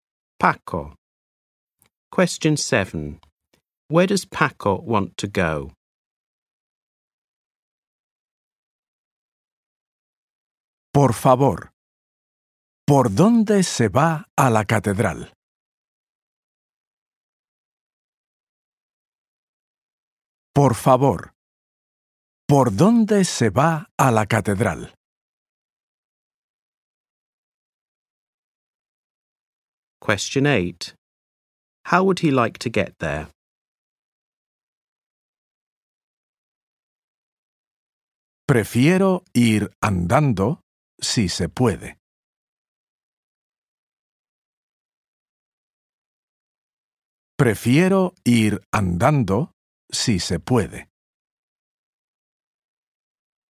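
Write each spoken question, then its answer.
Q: Where does Paco want to go?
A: To the cathedral

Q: How would he like to get there?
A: On foot (walking)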